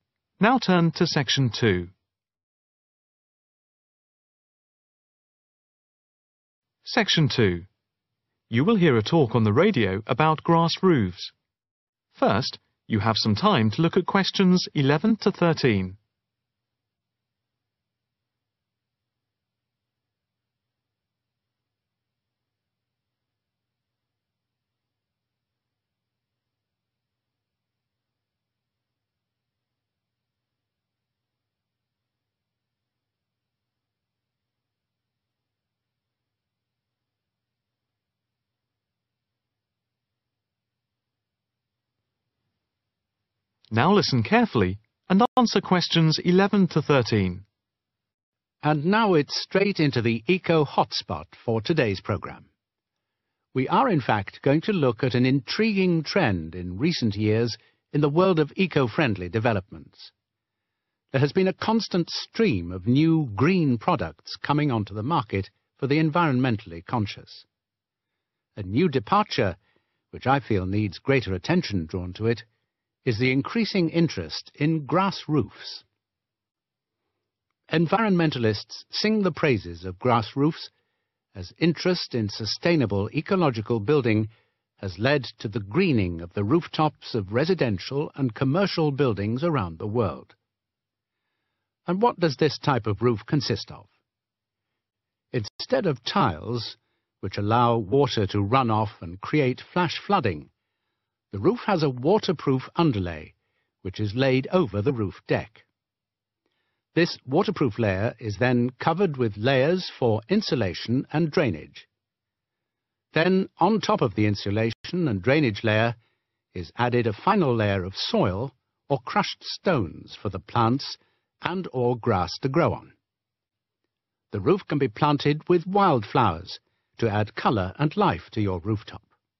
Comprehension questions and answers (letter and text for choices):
Choose the correct letter, A, B or C.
On the grass roof, soil or crushed stones are laid directly on top of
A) the insulation and drainage layer.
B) the waterproof underlay.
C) the wooden roof deck.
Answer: A) the insulation and drainage layer.